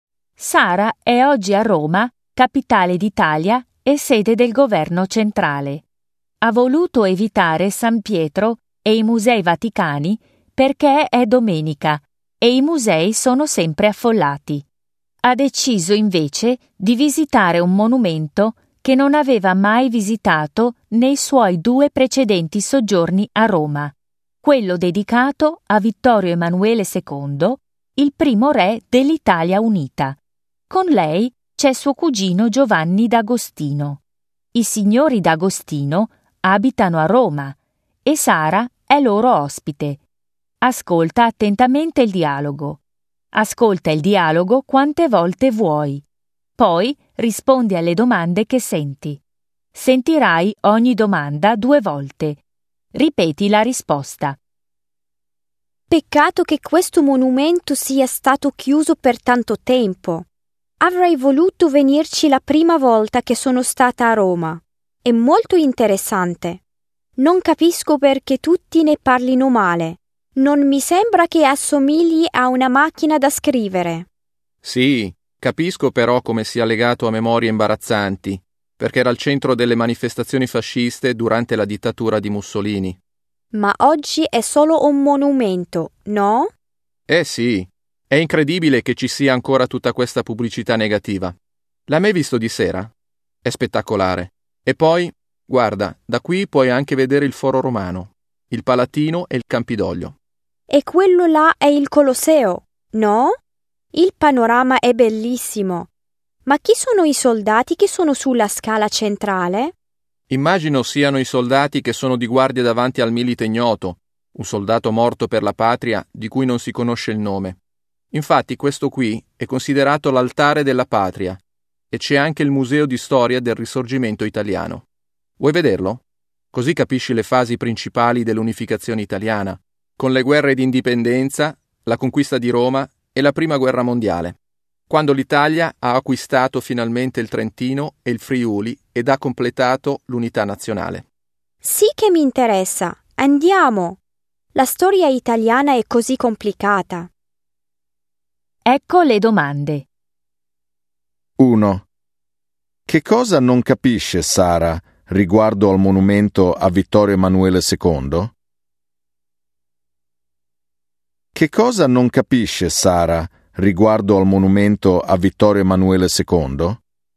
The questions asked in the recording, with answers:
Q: Che cosa non capisce Sara riguardo al monumento a Vittorio Emanuele II?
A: Non capisce perché tutti ne parlino male.